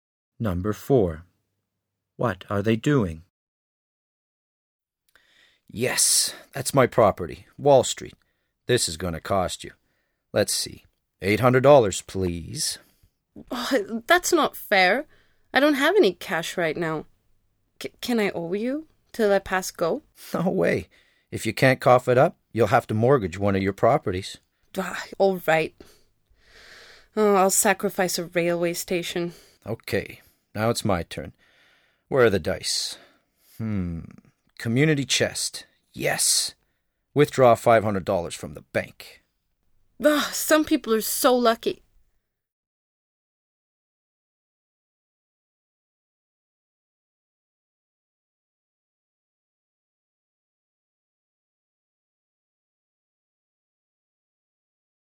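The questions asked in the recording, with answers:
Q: What are they doing?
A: Playing Monopoly (a board game)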